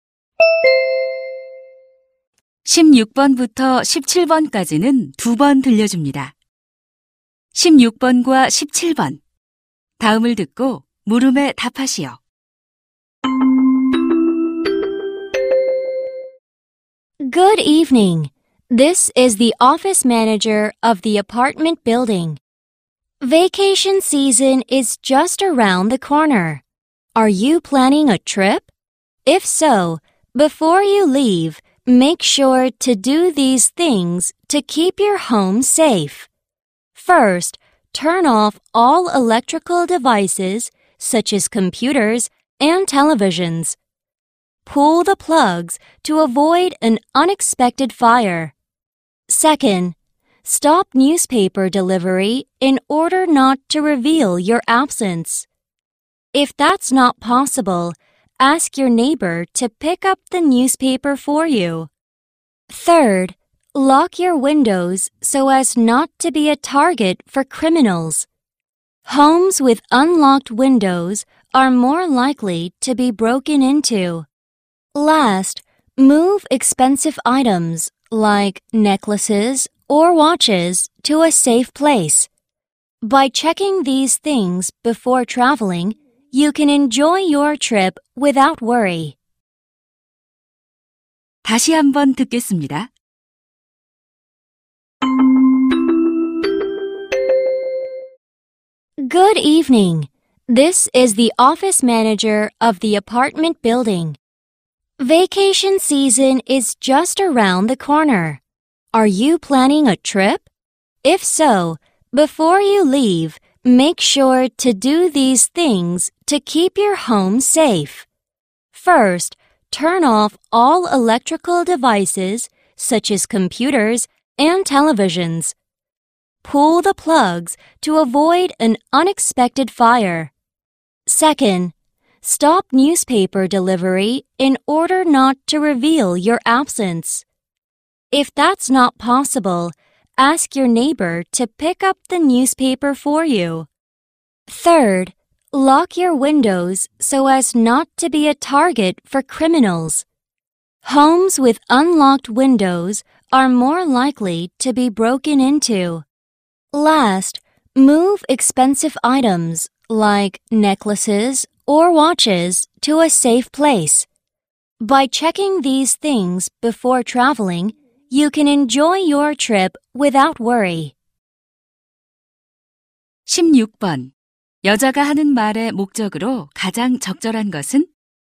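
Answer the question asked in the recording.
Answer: 여행 전 집을 안전하게 지키는 방법을 안내하려고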